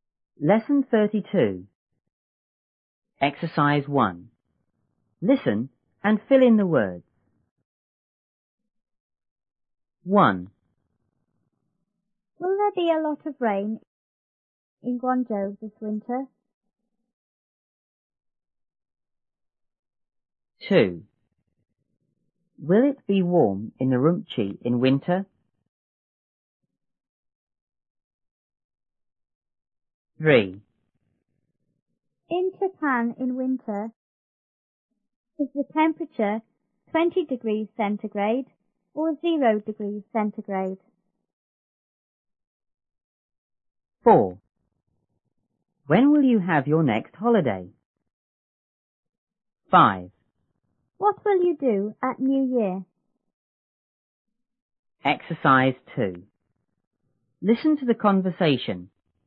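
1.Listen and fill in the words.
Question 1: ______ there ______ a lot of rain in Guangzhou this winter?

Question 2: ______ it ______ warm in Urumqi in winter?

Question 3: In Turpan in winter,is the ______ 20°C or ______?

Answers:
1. Will; be
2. Will; be
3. temperature; 0°C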